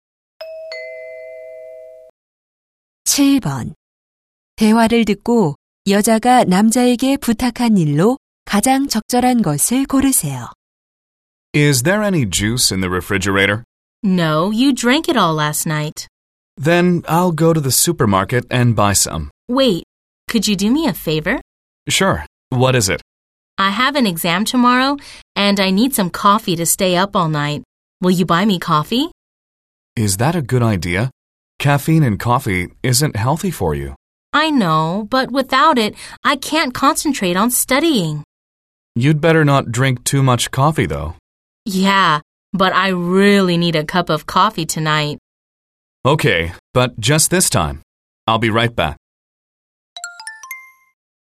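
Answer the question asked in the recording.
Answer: 커피 사다 주기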